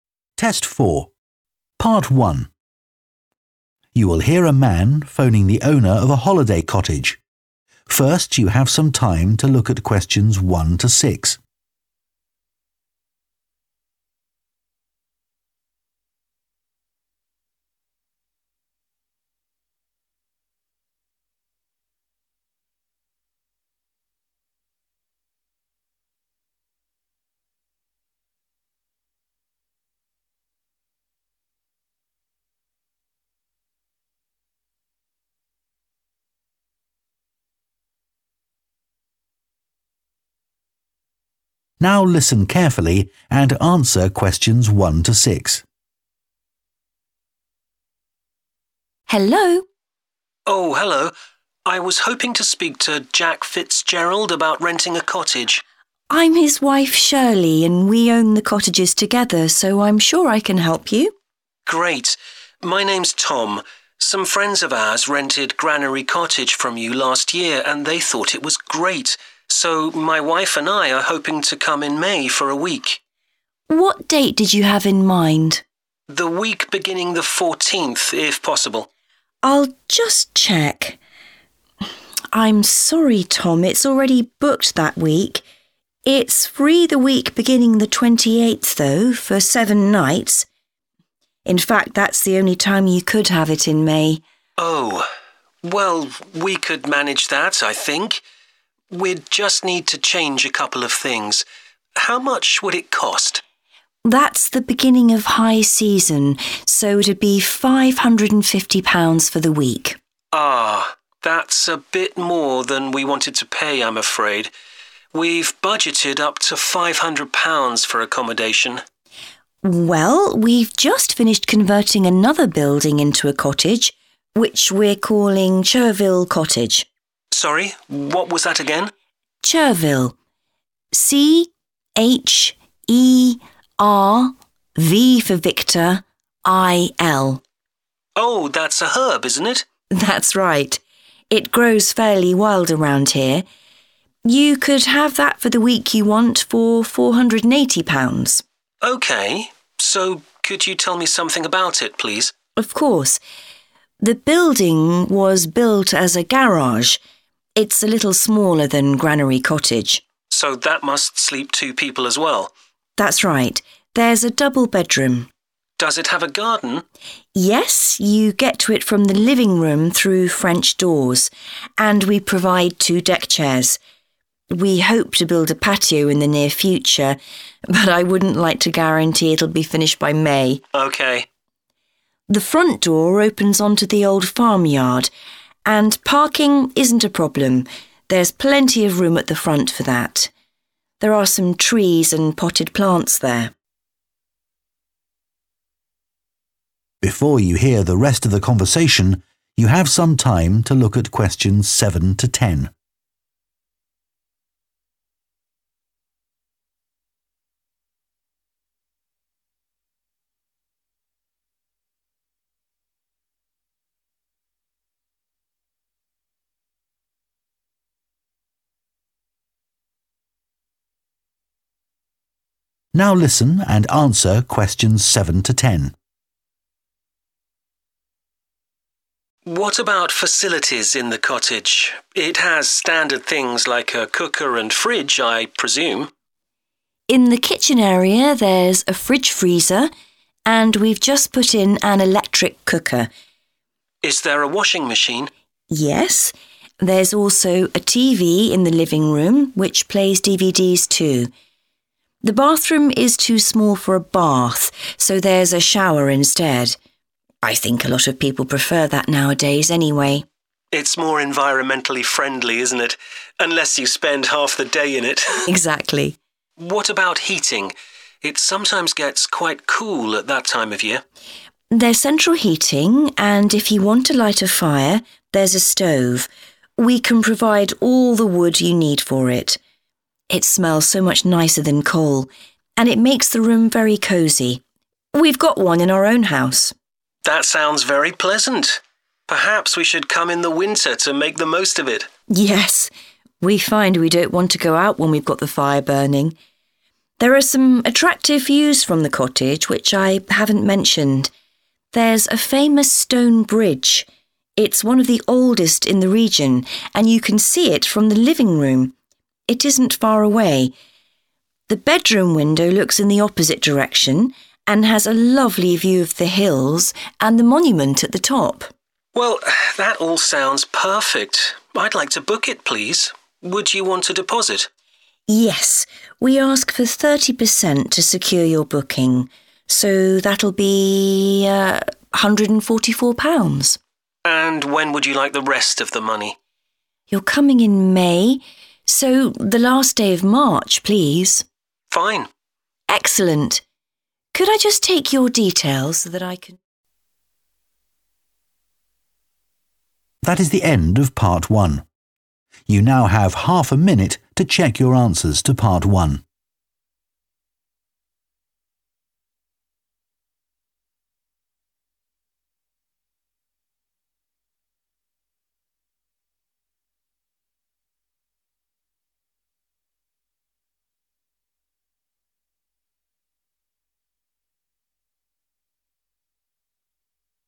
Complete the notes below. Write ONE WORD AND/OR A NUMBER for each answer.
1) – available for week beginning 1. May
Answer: 28th

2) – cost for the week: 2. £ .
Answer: 550

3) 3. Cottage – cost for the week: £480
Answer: Chervil

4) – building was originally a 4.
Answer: garage

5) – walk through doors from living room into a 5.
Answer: garden

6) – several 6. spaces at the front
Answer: parking

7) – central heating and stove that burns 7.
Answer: wood

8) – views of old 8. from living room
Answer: bridge

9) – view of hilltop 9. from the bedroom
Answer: monument

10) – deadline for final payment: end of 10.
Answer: March